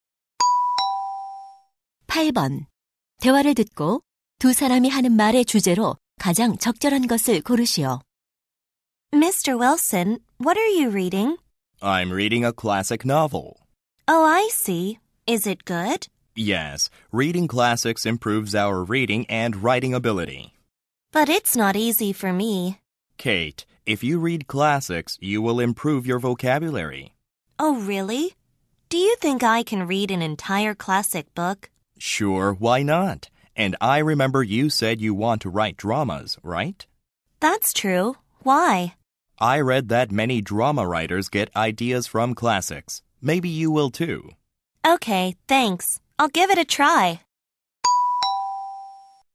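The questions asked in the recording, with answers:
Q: 대화를 듣고 두 사람이 하는 말의 주제로 가장 적절한 것을 고르시오.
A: 고전 읽기의 이점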